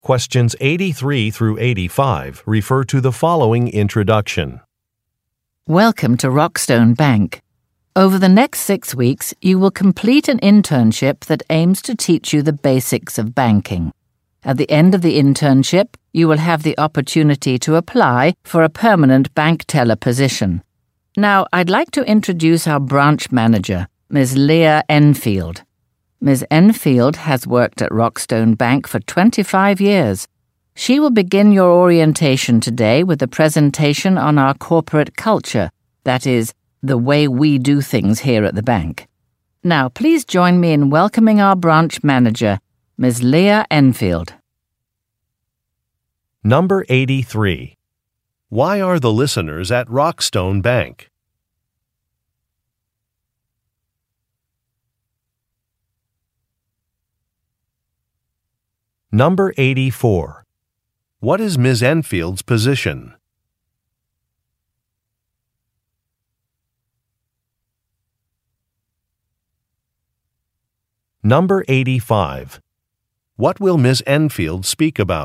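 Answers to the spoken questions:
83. To begin an internship
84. Branch manager
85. The bank's corporate culture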